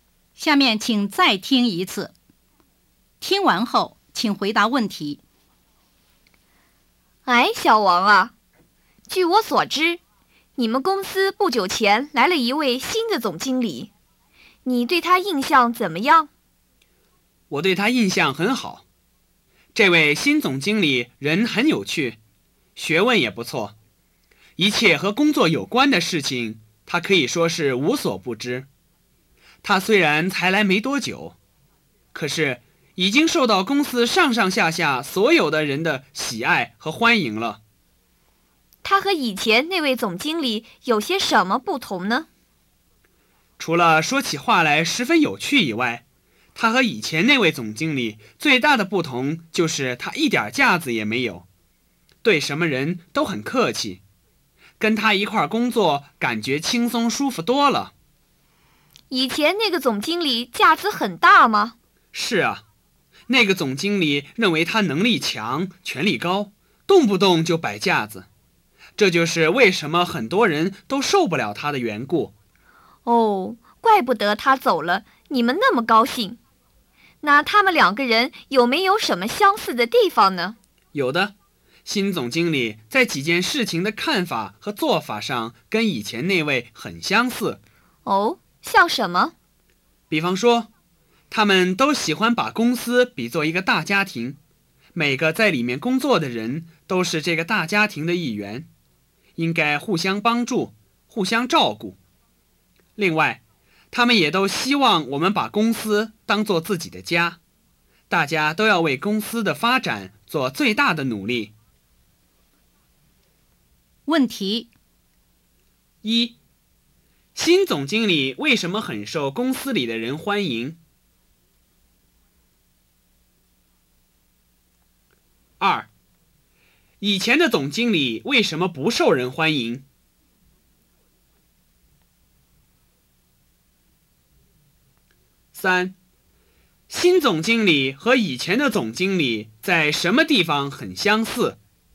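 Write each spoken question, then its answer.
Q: 新总经理为什么很受公司里的人欢迎?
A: 他人很有趣,学问不错,一点架子也没有,对什么人都很客气。

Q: 以前的总经理为什么不受人欢迎?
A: 他认为自己能力强、权力高,动不动就摆架子。

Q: 新总经理和以前的总经理在什么地方很相似?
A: 都把公司比作大家庭,希望大家把公司当作自己的家,为公司发展做最大的努力。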